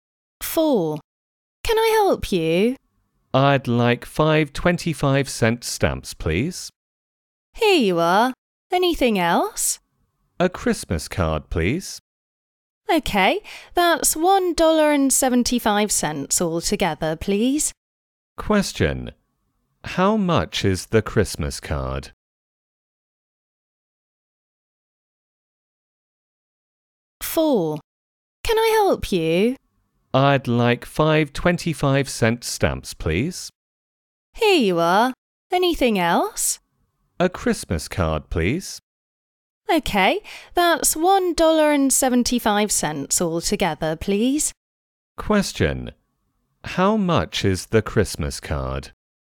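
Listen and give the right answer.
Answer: 50 cents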